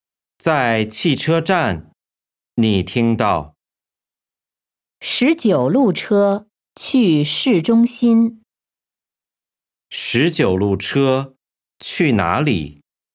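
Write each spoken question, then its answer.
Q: 十九路车去哪里?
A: 市中心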